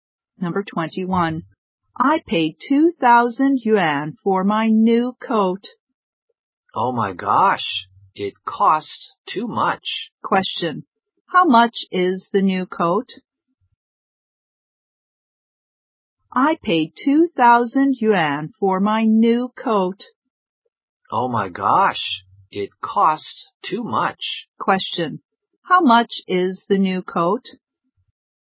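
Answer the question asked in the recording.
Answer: 2,000 yuan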